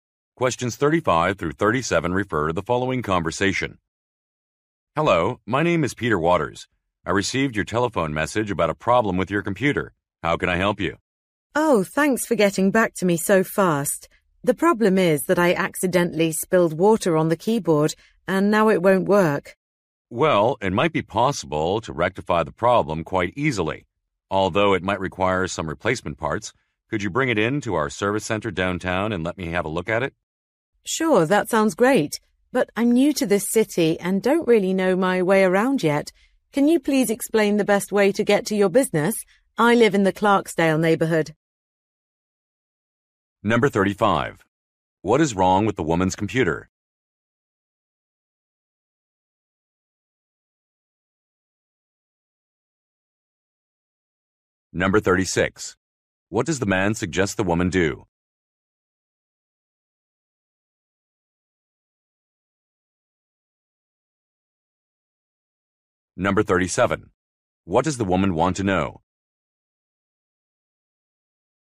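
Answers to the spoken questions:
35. Water was spilled on the keyboard and it won't work
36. Bring the computer to the service center downtown
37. How to get to the man's business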